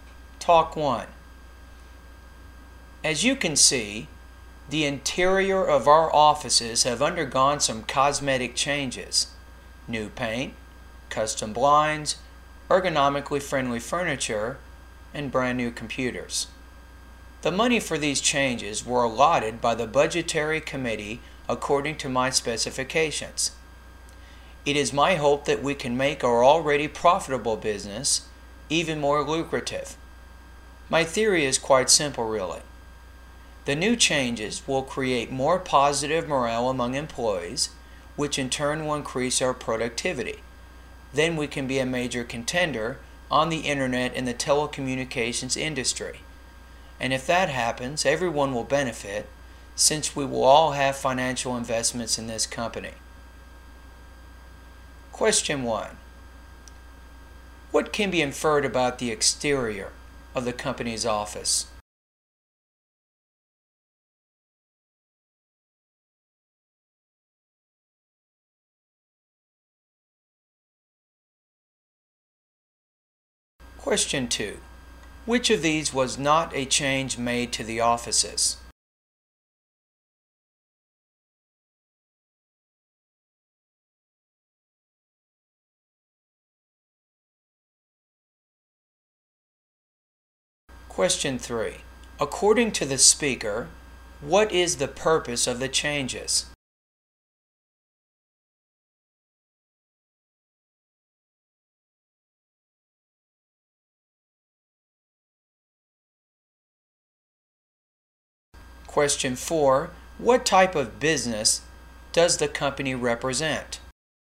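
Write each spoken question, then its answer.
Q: According to the speaker, what is the purpose of the changes?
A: To improve employee morale and productivity, making the business more profitable

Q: What type of business does the company represent?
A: Internet and telecommunications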